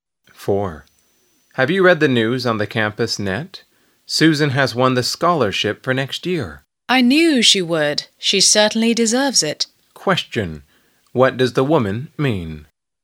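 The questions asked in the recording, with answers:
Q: What does the woman mean?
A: She expected Susan to win; Susan deserves it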